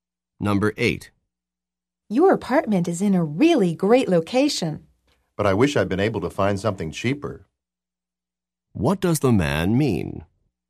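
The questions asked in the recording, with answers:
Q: What does the man mean?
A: The apartment is expensive.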